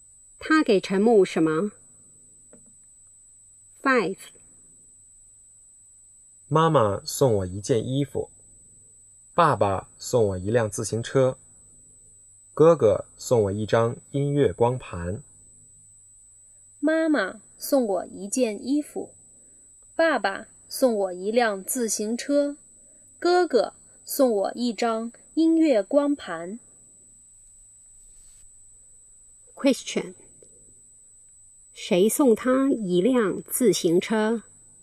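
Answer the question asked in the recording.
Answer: 爸爸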